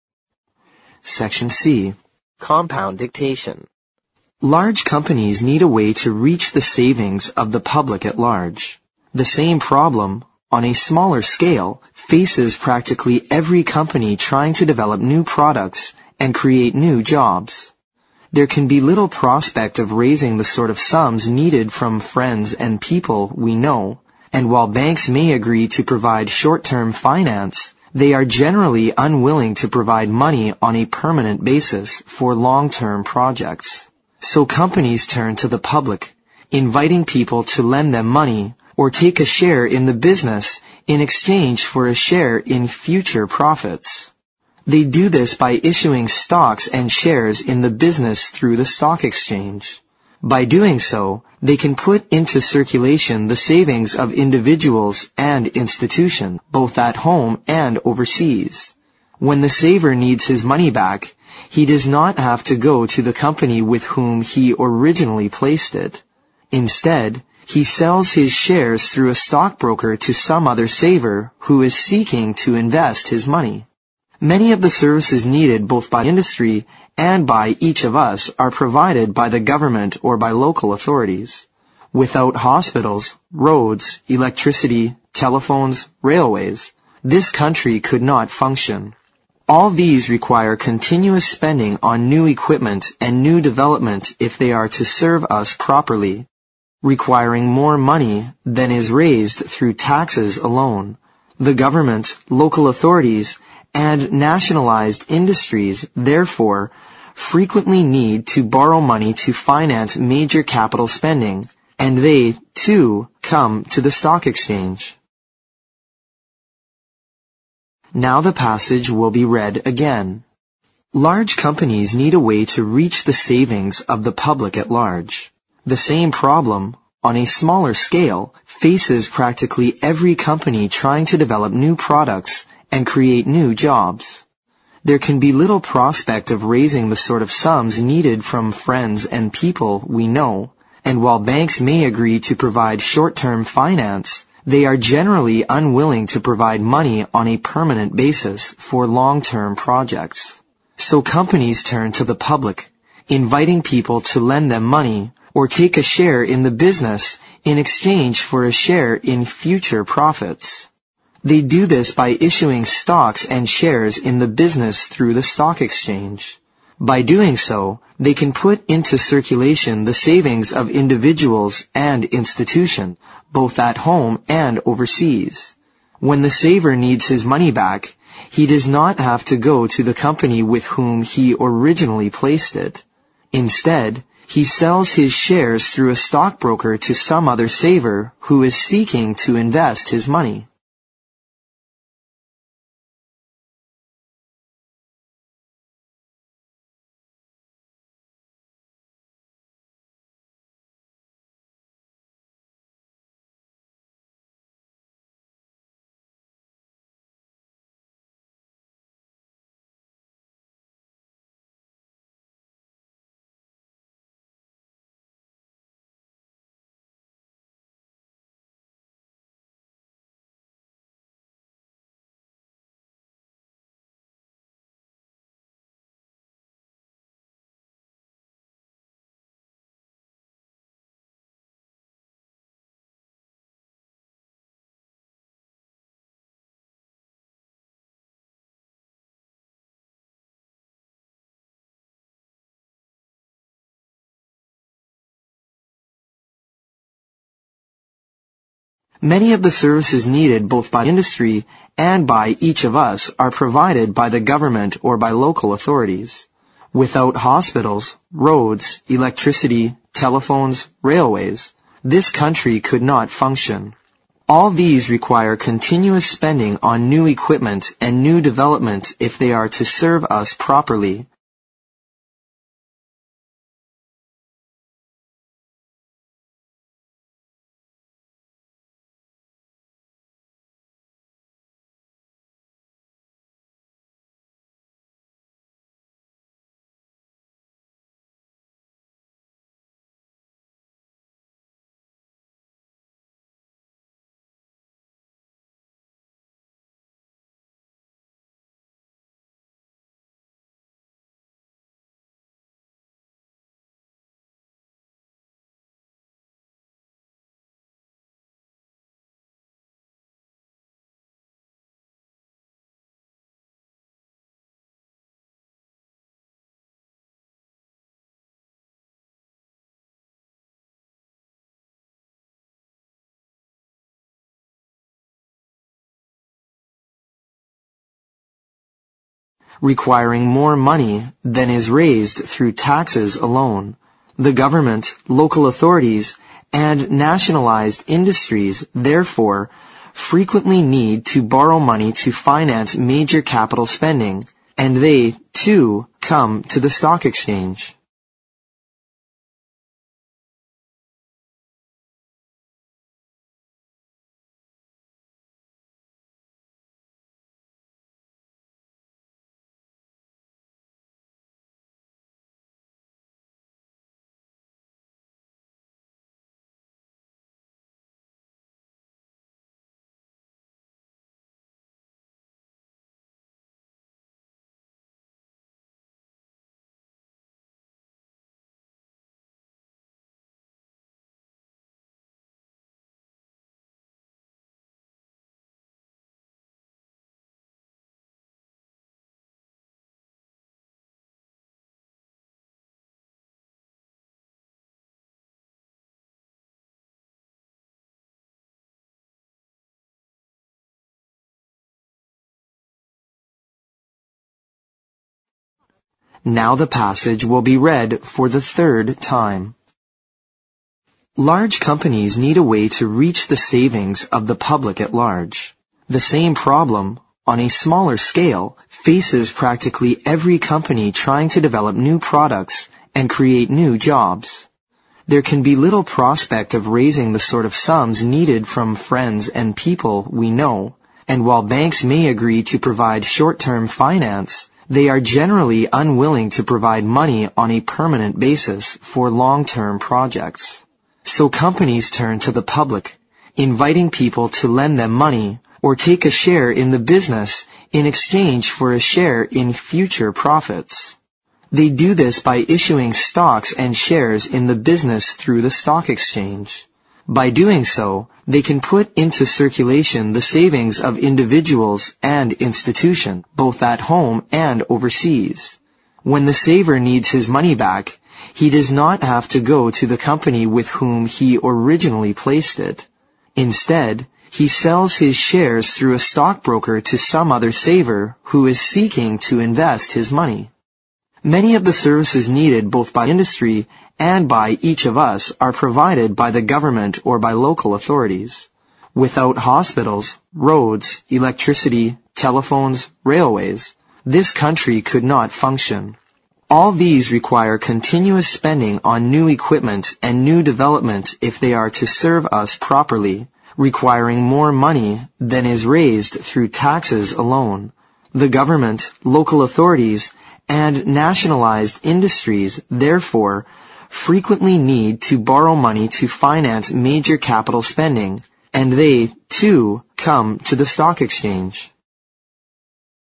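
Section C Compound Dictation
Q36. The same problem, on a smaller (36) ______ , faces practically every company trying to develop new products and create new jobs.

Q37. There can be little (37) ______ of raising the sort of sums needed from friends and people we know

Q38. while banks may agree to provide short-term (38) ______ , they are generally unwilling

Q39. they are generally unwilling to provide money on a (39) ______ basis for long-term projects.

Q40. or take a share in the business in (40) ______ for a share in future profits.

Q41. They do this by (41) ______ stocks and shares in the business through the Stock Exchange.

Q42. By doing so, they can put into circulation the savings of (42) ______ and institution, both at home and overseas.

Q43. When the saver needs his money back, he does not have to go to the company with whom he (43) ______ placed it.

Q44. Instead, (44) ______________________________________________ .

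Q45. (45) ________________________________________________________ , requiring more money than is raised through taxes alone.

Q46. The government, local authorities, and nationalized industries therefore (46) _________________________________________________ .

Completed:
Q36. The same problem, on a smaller scale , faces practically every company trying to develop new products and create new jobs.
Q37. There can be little prospect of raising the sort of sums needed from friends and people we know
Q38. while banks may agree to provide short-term finance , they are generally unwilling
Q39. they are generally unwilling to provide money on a permanent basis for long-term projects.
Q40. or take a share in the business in exchange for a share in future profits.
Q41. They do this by issuing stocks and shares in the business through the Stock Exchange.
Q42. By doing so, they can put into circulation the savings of individuals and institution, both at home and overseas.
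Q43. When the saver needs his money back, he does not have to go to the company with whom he originally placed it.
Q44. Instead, he sells his shares through a stockbroker to some other saver who is seeking to invest his money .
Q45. All these require continuous spending on new equipment and new development if they are to serve us properly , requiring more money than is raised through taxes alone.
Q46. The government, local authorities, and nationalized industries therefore frequently need to borrow money to finance major capital spending, and they, too, come to the stock exchange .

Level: 六级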